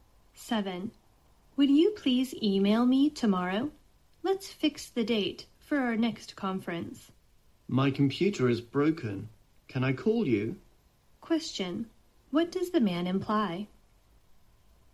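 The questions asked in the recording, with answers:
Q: What does the man imply?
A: He can't send an email and would rather phone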